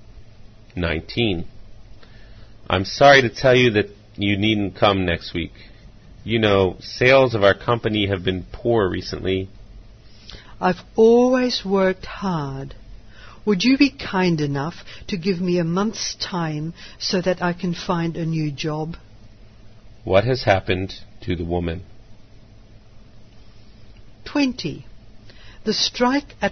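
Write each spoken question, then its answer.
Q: What has happened to the woman?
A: She has lost her job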